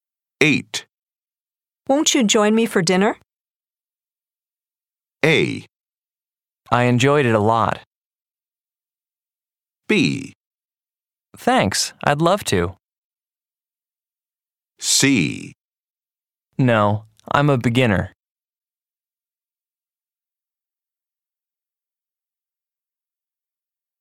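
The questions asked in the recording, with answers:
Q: Won't you join me for dinner?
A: B: Thanks, I'd love to.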